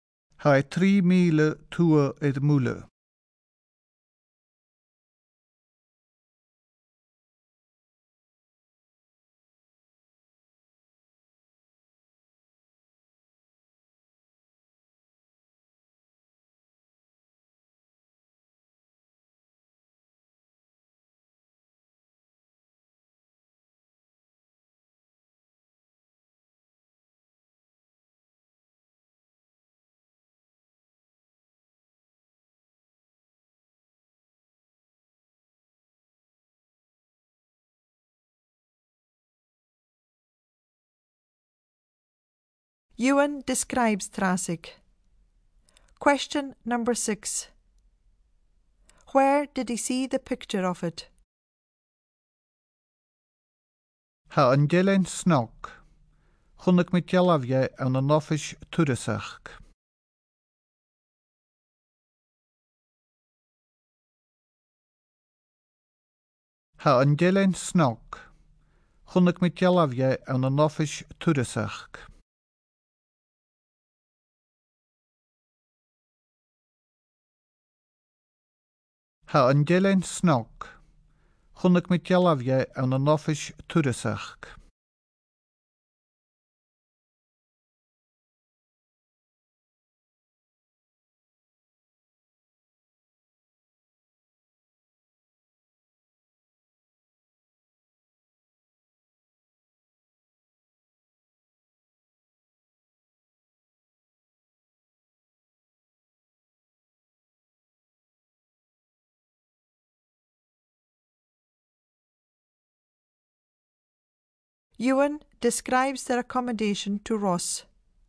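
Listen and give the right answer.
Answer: In the tourist office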